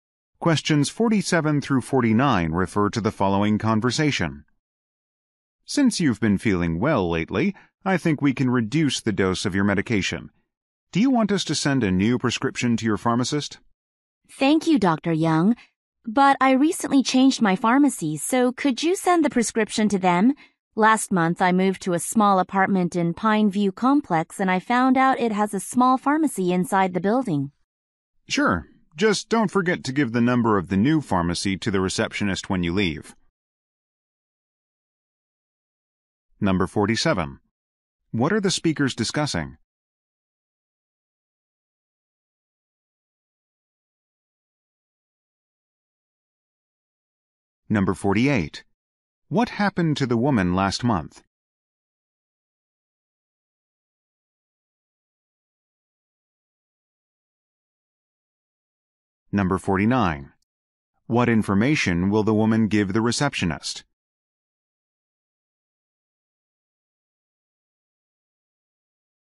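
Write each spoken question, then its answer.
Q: What are the speakers discussing?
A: A prescription for medication

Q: What happened to the woman last month?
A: She moved to a new apartment

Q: What information will the woman give the receptionist?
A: The new pharmacy's number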